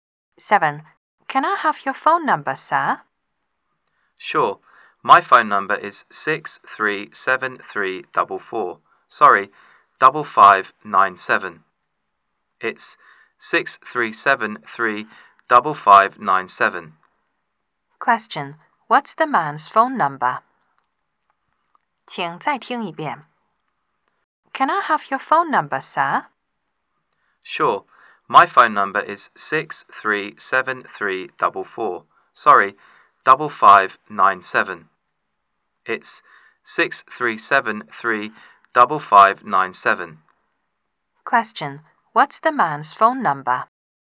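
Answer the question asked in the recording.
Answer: 6373-5597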